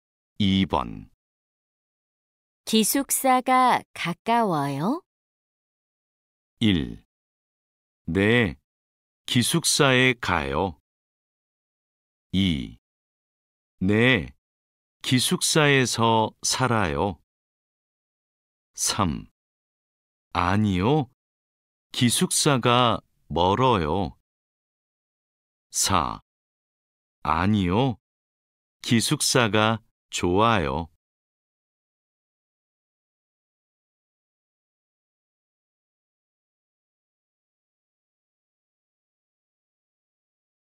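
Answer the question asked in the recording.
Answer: 3: 아니요, 기숙사가 멀어요.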